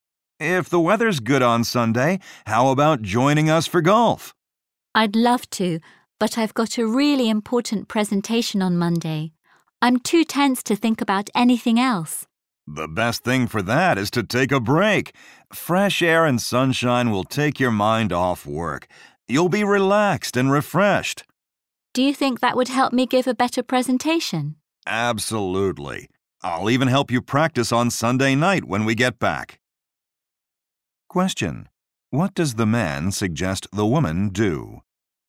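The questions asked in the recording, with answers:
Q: What does the man suggest the woman do?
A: Take a break and play golf with them on Sunday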